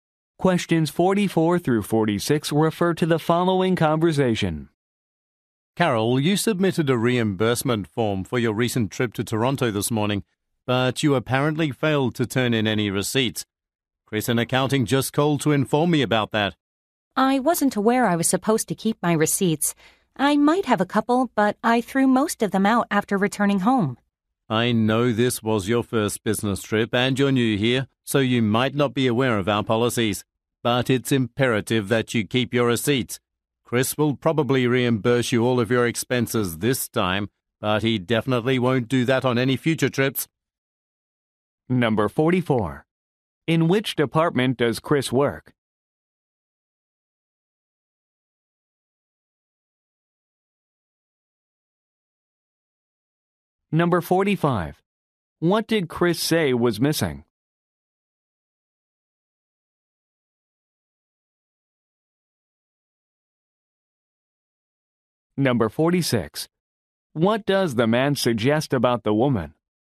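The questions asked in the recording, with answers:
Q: In which department does Chris work?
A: Accounting

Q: What did Chris say was missing?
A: Receipts

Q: What does the man suggest about the woman?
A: She is a new employee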